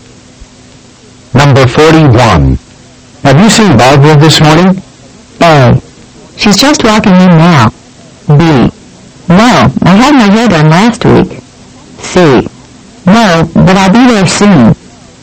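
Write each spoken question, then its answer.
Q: Have you seen Barbara this morning?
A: A: She's just walking in now.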